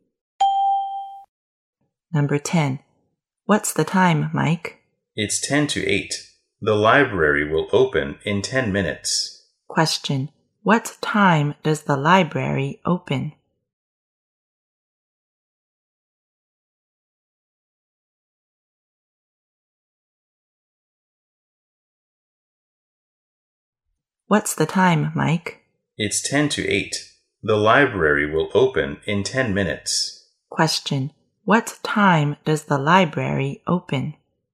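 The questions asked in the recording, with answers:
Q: What time does the library open?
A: At 8:00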